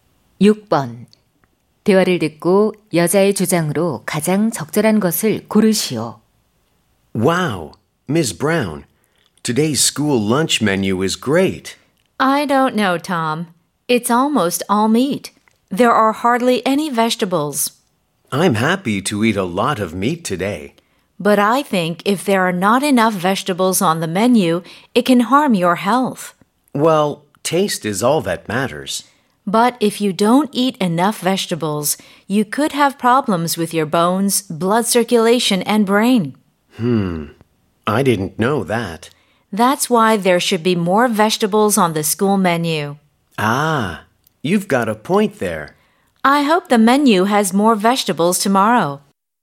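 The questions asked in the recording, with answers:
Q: 대화를 듣고 여자의 주장으로 가장 적절한 것을 고르시오.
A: 학교 급식에 채소가 더 많아야 한다.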